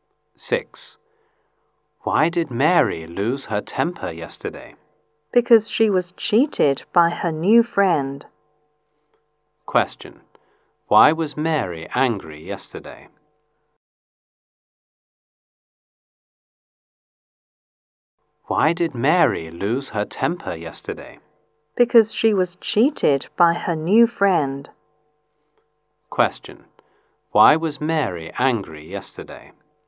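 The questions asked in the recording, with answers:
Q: Why was Mary angry yesterday?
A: Because she was cheated by her new friend.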